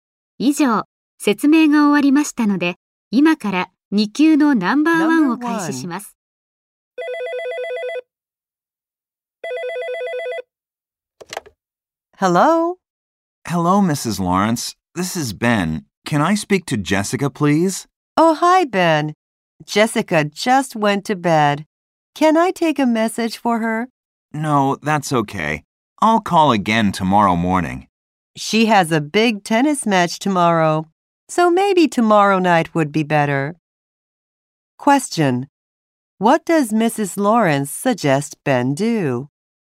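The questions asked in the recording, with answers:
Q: What does Mrs. Lawrence suggest Ben do?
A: Call Jessica tomorrow night.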